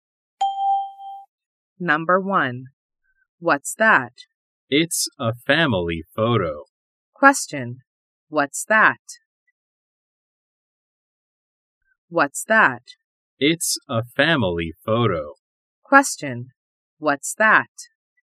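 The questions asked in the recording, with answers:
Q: What's that?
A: It's a family photo.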